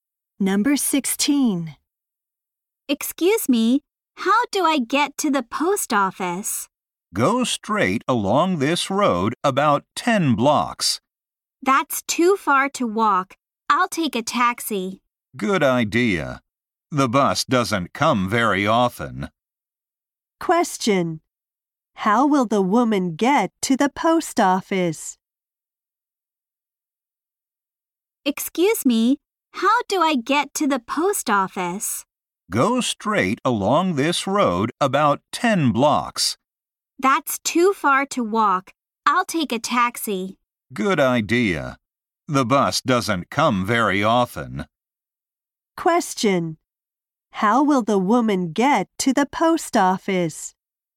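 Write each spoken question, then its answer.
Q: How will the woman get to the post office?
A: By taxi.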